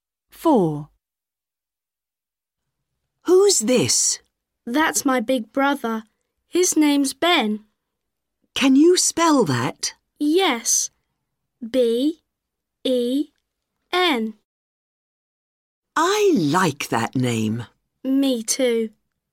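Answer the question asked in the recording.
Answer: Ben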